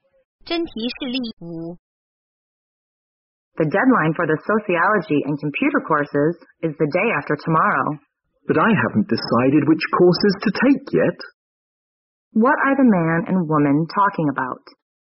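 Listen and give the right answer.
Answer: Choosing courses before the deadline.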